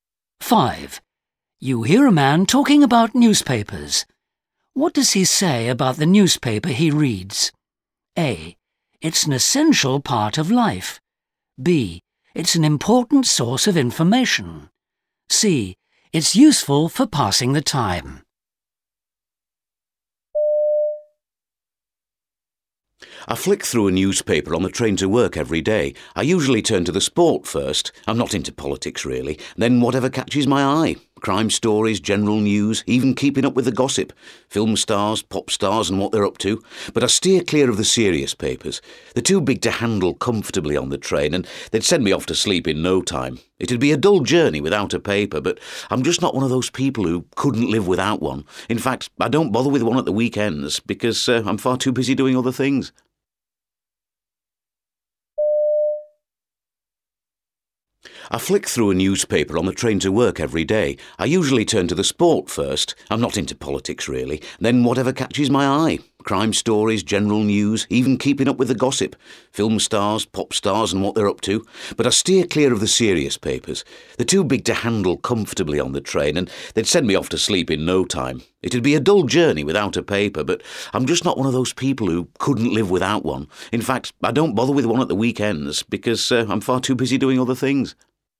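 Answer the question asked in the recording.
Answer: C: It's useful for passing the time.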